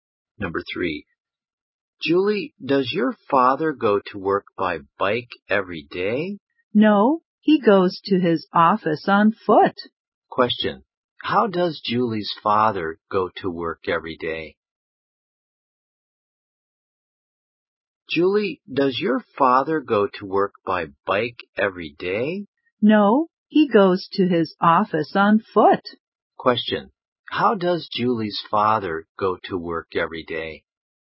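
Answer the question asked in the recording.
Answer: On foot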